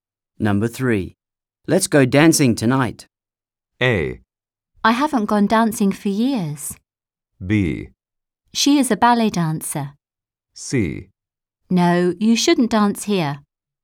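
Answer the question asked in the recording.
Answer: A: I haven't gone dancing for years.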